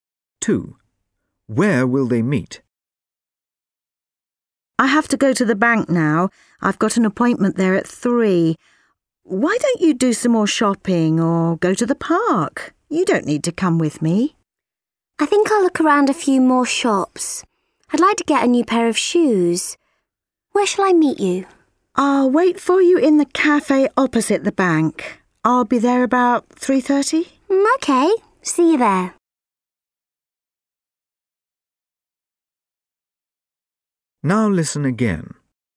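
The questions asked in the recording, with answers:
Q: Where will they meet?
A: In the cafe opposite the bank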